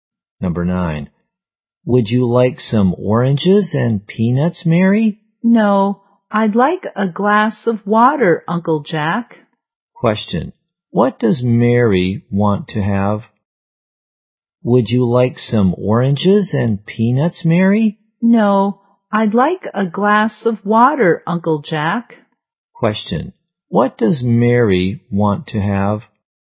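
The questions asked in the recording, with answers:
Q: What does Mary want to have?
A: A glass of water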